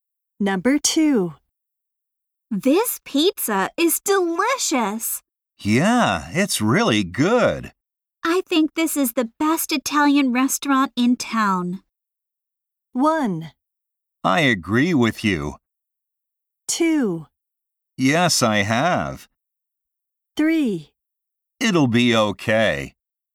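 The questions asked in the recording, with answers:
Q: I think this is the best Italian restaurant in town.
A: 1: I agree with you.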